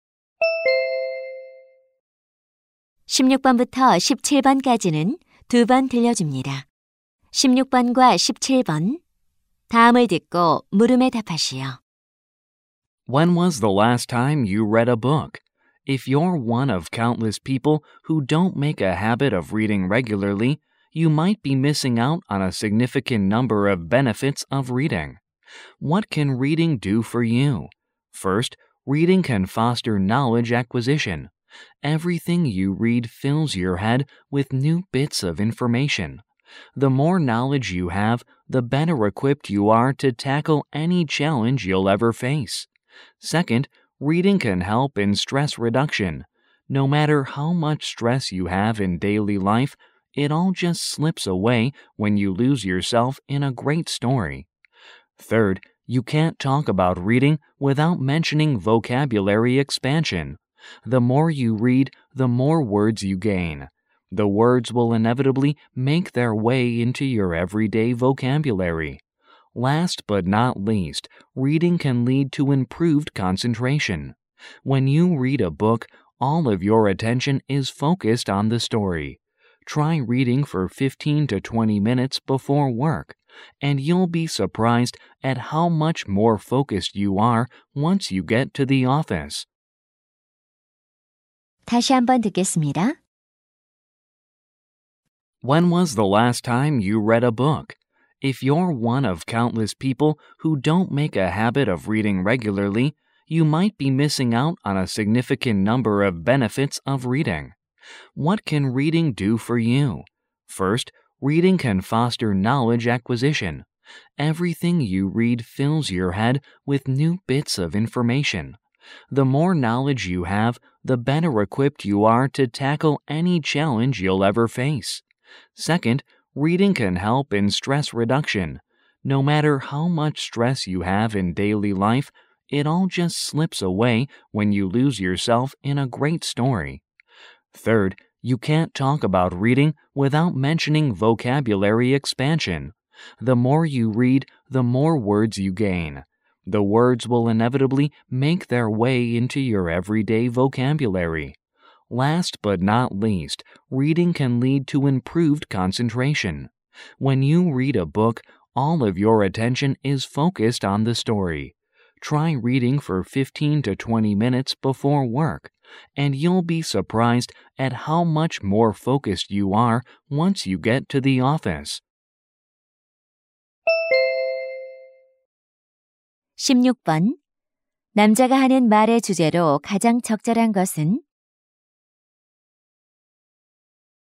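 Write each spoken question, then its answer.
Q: 남자가 하는 말의 주제로 가장 적절한 것은?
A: 독서의 이점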